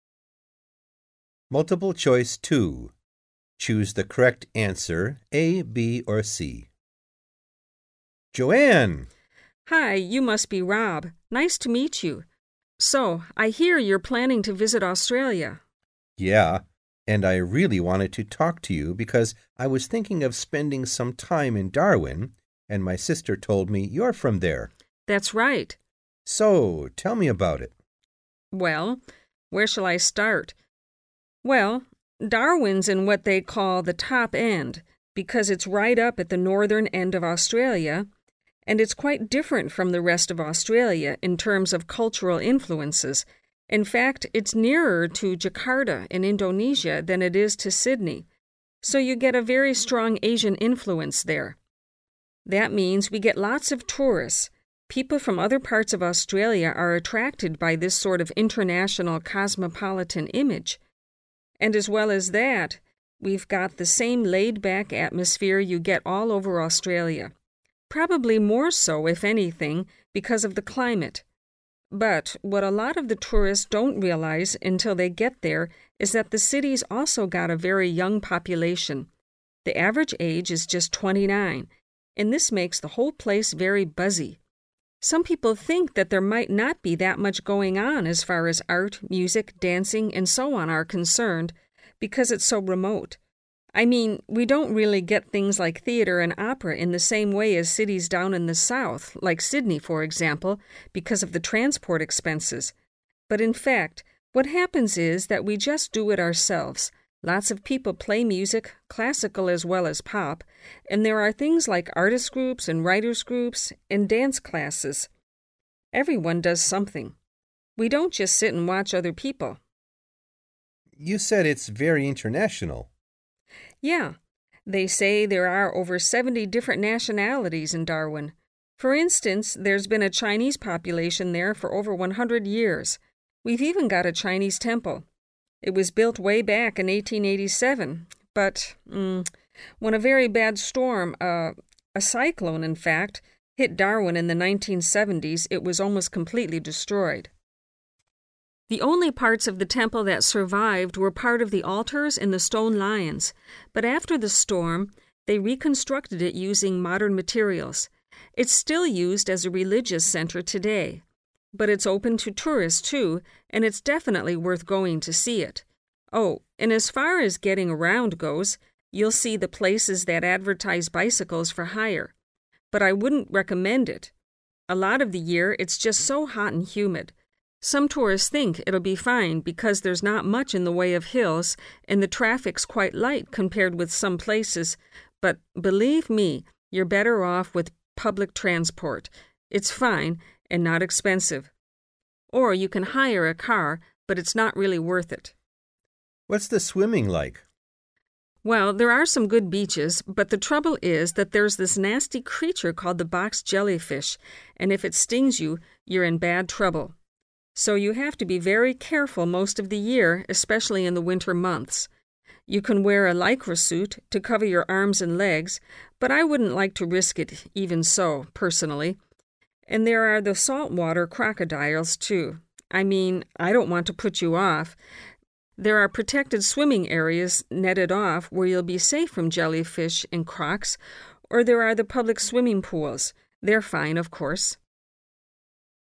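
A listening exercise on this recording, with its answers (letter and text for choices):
Choose the correct answer A, B or C.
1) Joanne says that visitors to Darwin are often surprised by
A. the number of young people.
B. the casual atmosphere.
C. the range of cultures.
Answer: A. the number of young people.

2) To enjoy cultural activities, the people of Darwin tend to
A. travel to southern Australia.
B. bring in artists from other areas.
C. involve themselves in production.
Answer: C. involve themselves in production.

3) The Chinese temple in Darwin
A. is no longer used for its original purpose.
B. was rebuilt after its destruction in a storm.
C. was demolished to make room for new buildings.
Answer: B. was rebuilt after its destruction in a storm.

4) The main problem with travelling by bicycle is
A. the climate.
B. the traffic.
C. the hills.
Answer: A. the climate.

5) What does Joanne say about swimming in the sea?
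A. It is essential to wear a protective suit.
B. Swimming is only safe during the winter.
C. You should stay in certain restricted areas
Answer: C. You should stay in certain restricted areas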